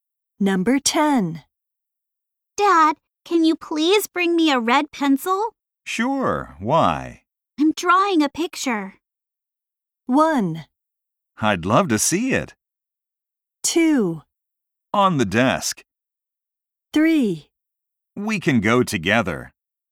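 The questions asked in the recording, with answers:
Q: I'm drawing a picture.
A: 1: I'd love to see it.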